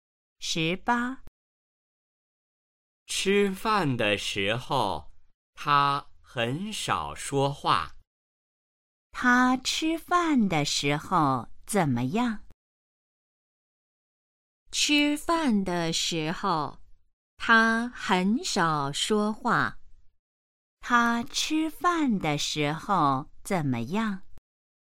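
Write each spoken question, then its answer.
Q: 他吃饭的时候怎么样?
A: 很少说话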